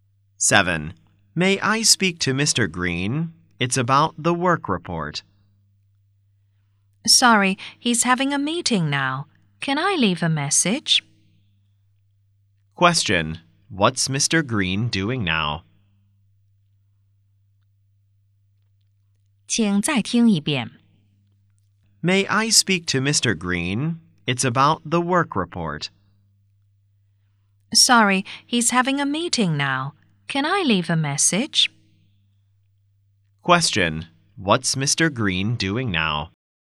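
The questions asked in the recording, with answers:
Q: What's Mr. Green doing now?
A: He's having a meeting.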